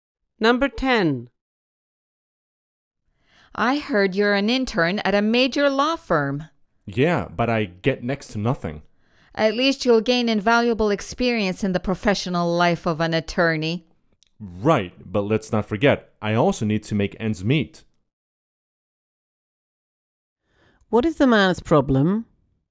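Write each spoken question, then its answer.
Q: What is the man's problem?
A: His internship pays very little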